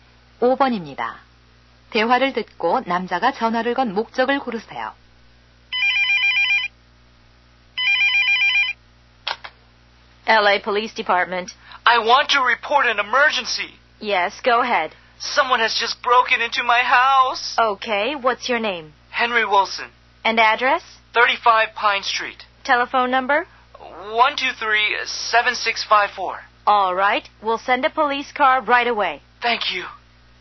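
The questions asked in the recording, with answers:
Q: 대화를 듣고 남자가 전화를 건 목적을 고르세요.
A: 집에 도둑이 든 것을 신고하려고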